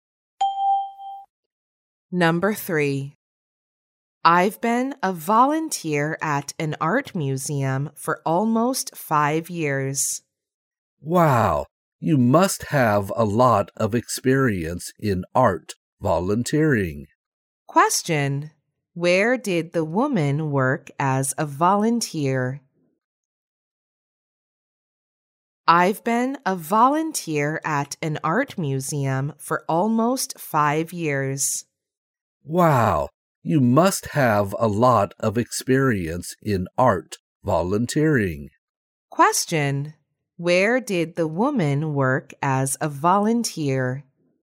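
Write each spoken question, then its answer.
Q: Where did the woman work as a volunteer?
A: At an art museum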